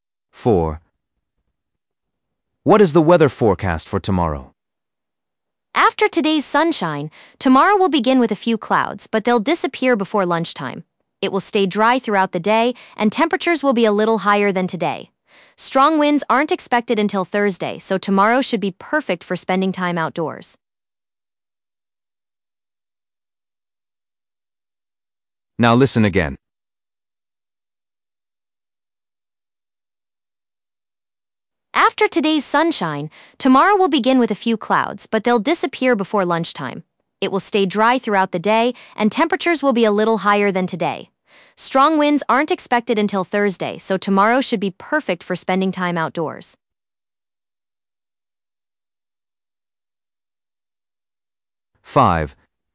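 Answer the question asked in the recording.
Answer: dry and warmer, clouds clearing before lunch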